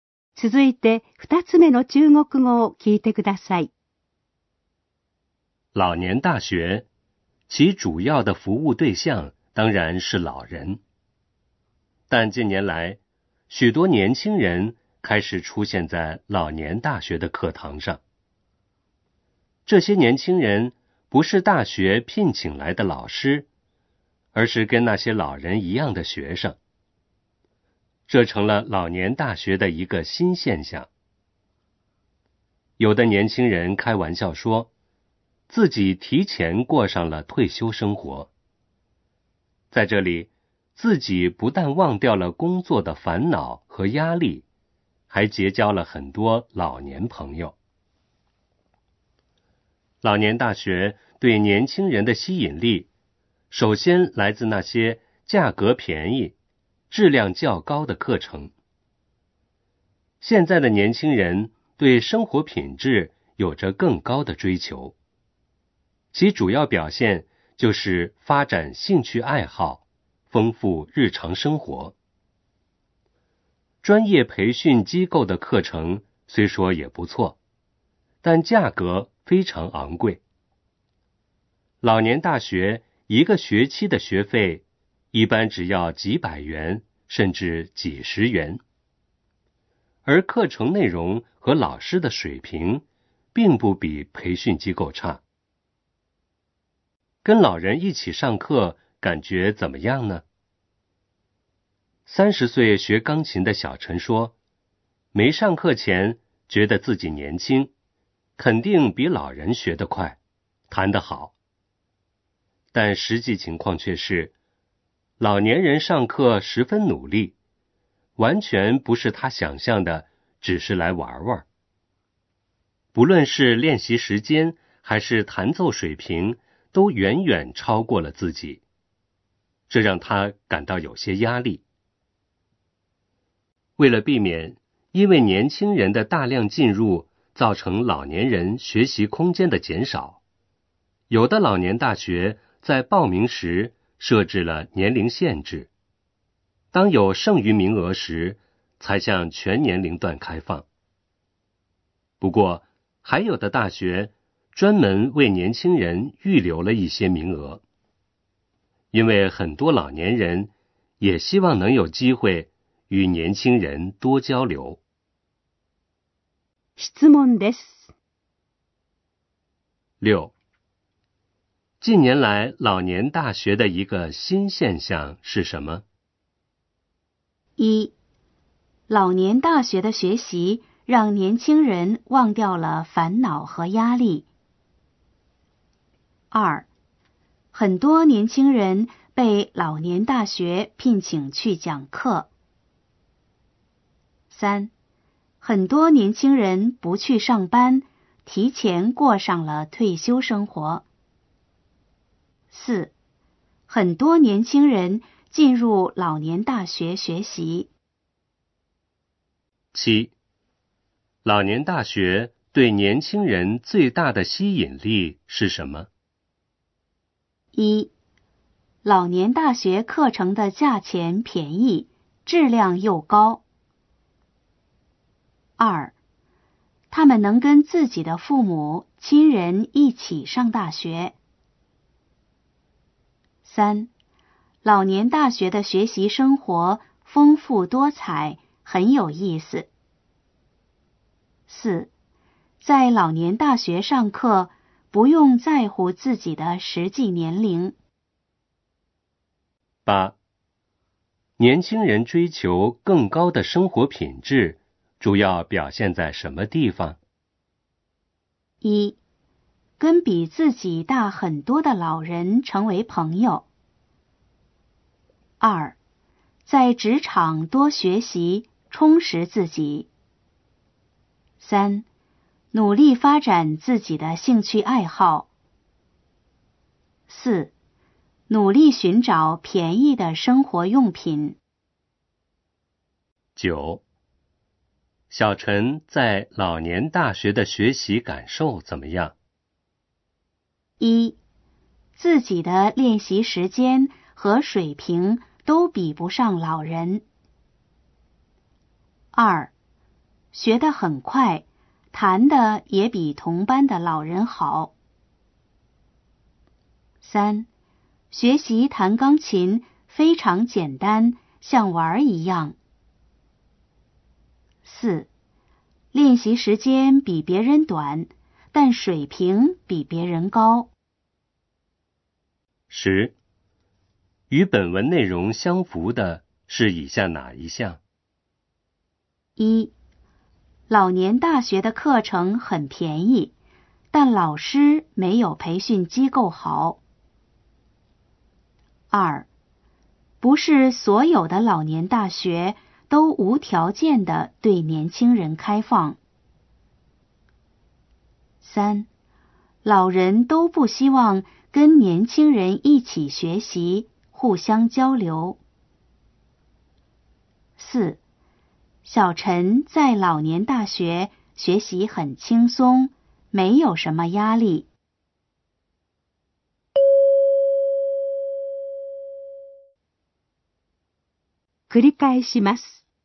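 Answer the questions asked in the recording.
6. 4: 很多年轻人进入老年大学学习。
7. 1: 老年大学课程的价钱便宜,质量又高。
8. 3: 努力发展自己的兴趣爱好。
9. 1: 自己的练习时间和水平都比不上老人。
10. 2: 不是所有的老年大学都无条件地对年轻人开放。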